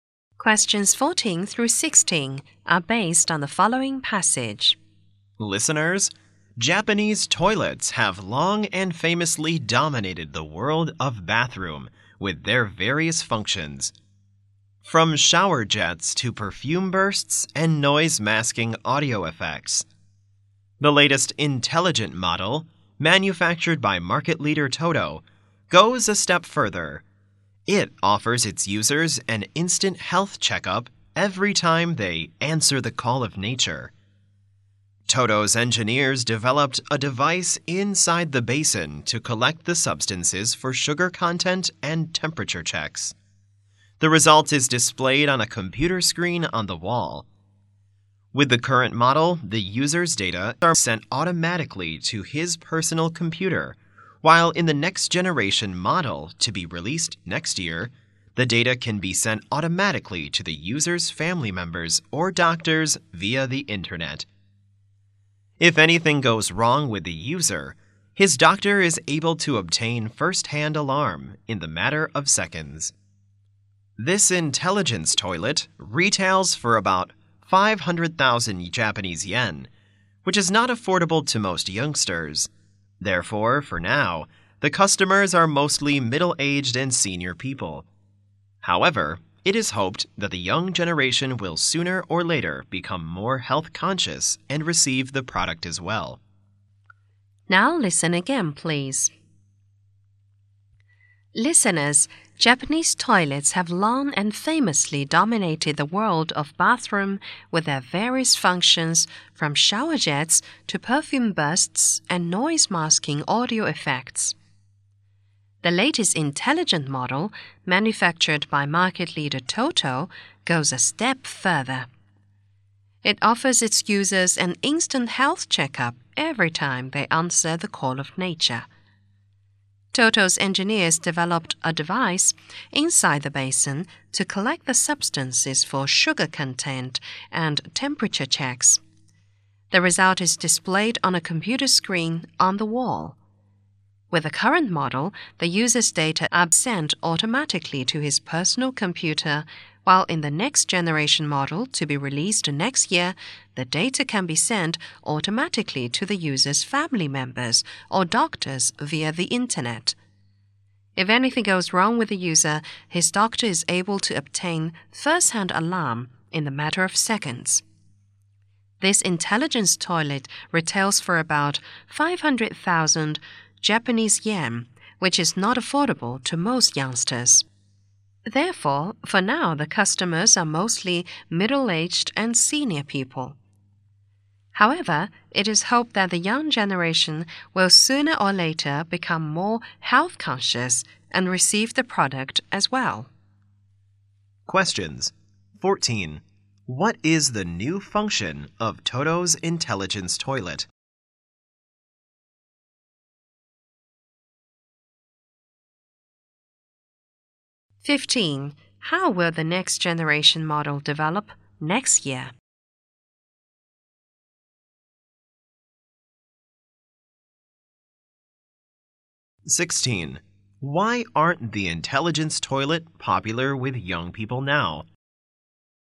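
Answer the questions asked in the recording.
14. It offers an instant health checkup
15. Data will be sent automatically to family members or doctors via the internet
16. It is too expensive for them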